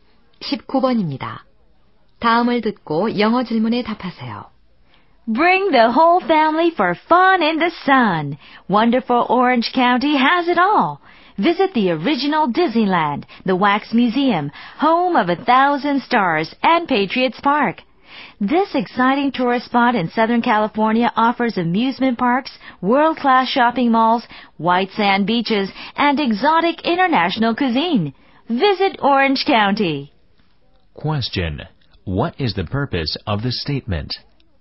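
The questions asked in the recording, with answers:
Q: Question. What is the purpose of the statement?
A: To advertise Orange County as a tourist spot.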